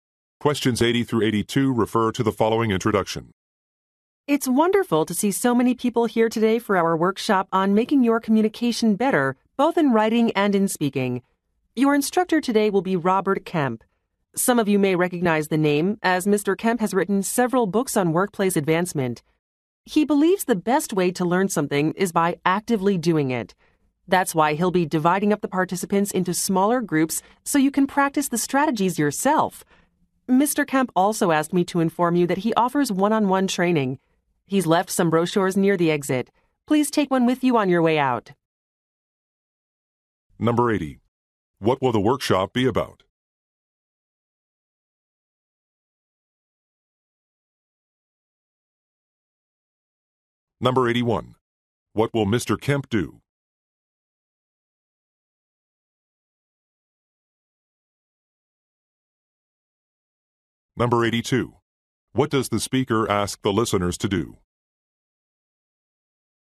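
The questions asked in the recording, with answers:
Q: What will the workshop be about?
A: Improving communication skills

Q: What will Mr. Kemp do?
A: Divide participants into smaller groups

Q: What does the speaker ask the listeners to do?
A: Take a brochure on the way out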